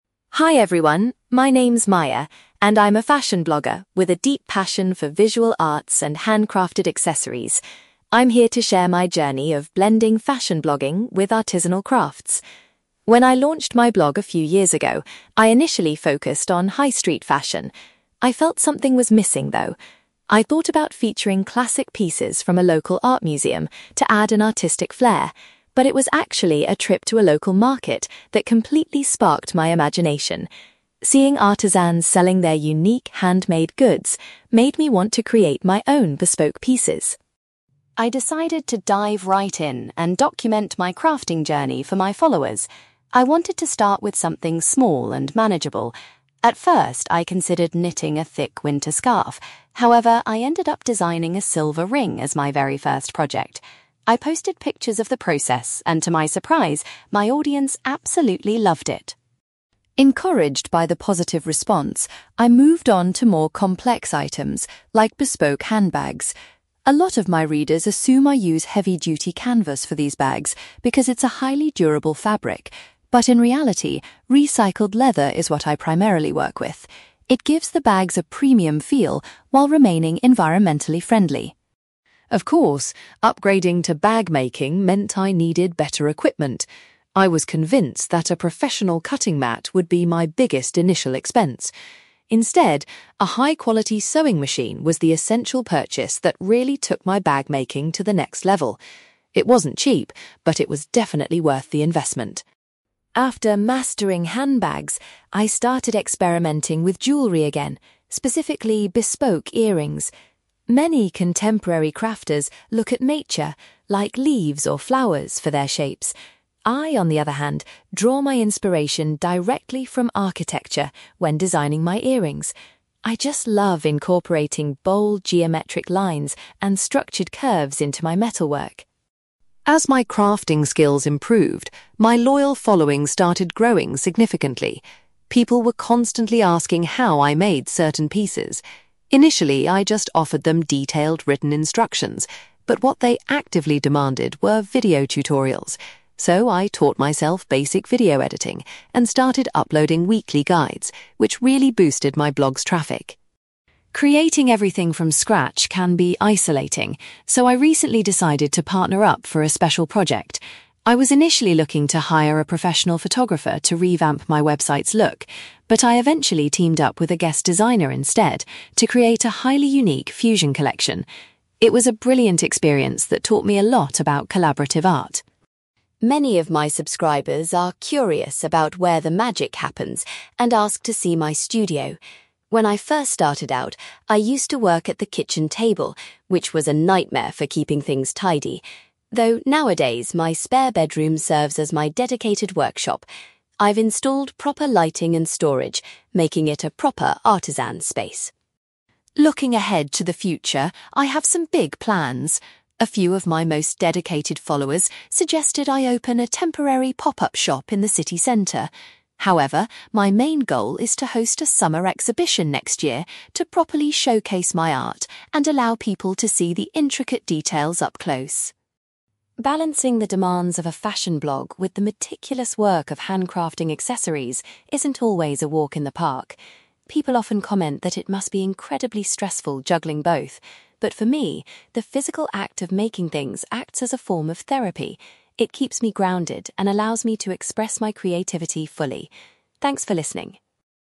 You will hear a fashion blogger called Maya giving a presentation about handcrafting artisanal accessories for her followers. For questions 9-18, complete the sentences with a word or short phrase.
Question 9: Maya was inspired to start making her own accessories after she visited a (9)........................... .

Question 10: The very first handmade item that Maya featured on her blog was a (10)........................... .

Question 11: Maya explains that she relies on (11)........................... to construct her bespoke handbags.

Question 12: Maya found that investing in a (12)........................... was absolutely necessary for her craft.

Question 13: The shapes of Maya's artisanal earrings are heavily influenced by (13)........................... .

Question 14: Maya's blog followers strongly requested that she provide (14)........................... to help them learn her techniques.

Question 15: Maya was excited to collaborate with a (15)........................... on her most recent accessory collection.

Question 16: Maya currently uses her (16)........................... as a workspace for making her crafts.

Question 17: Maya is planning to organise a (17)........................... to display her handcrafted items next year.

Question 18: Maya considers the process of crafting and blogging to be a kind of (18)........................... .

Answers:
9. local market
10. silver ring
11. recycled leather
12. sewing machine
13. architecture
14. video tutorials
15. guest designer
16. spare bedroom
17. summer exhibition
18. therapy

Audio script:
Maya: Hi everyone, my name is Maya, and I'm a fashion blogger with a deep passion for visual arts and handcrafted accessories. I'm here to share my journey of blending fashion blogging with artisanal crafts. When I launched my blog a few years ago, I initially focused on high-street fashion. I felt something was missing, though. I thought about featuring classic pieces from a local art museum to add an artistic flair, but it was actually a trip to a local market that completely sparked my imagination. Seeing artisans selling their unique, handmade goods made me want to create my own bespoke pieces.
I decided to dive right in and document my crafting journey for my followers. I wanted to start with something small and manageable. At first, I considered knitting a thick winter scarf, however, I ended up designing a silver ring as my very first project. I posted pictures of the process, and to my surprise, my audience absolutely loved it!
Encouraged by the positive response, I moved on to more complex items, like bespoke handbags. A lot of my readers assume I use heavy-duty canvas for these bags because it's a highly durable fabric, but in reality, recycled leather is what I primarily work with. It gives the bags a premium feel while remaining environmentally friendly.
Of course, upgrading to bag-making meant I needed better equipment. I was convinced that a professional cutting mat would be my biggest initial expense. Instead, a high-quality sewing machine was the essential purchase that really took my bag-making to the next level. It wasn't cheap, but it was definitely worth the investment.
After mastering handbags, I started experimenting with jewellery again, specifically bespoke earrings. Many contemporary crafters look at nature, like leaves or flowers, for their shapes. I, on the other hand, draw my inspiration directly from architecture when designing my earrings. I just love incorporating bold geometric lines and structured curves into my metalwork.
As my crafting skills improved, my loyal following started growing significantly. People were constantly asking how I made certain pieces. Initially, I just offered them detailed written instructions, but what they actively demanded were video tutorials. So, I taught myself basic video editing and started uploading weekly guides, which really boosted my blog's traffic.
Creating everything from scratch can be isolating, so I recently decided to partner up for a special project. I was initially looking to hire a professional photographer to revamp my website's look, but I eventually teamed up with a guest designer instead to create a highly unique fusion collection. It was a brilliant experience that taught me a lot about collaborative art.
Many of my subscribers are curious about where the magic happens and ask to see my studio. When I first started out, I used to work at the kitchen table, which was a nightmare for keeping things tidy. Though nowadays, my spare bedroom serves as my dedicated workshop. I've installed proper lighting and storage, making it a proper artisan's space.
Looking ahead to the future, I have some big plans. A few of my most dedicated followers suggested I open a temporary pop-up shop in the city centre. However, my main goal is to host a summer exhibition next year to properly showcase my art and allow people to see the intricate details up close.
Balancing the demands of a fashion blog with the meticulous work of handcrafting accessories isn't always a walk in the park. People often comment that it must be incredibly stressful juggling both, but for me, the physical act of making things acts as a form of therapy. It keeps me grounded and allows me to express my creativity fully. Thanks for listening!

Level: B2